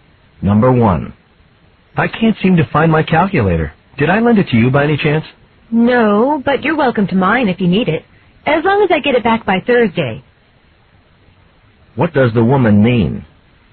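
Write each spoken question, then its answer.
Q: What does the woman mean?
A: She will lend the man her calculator if he returns it by Thursday.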